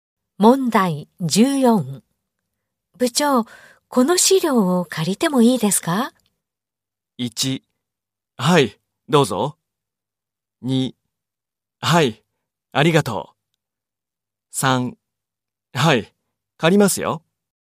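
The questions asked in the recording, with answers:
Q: 部長、この資料を借りてもいいですか?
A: 1: はい、どうぞ。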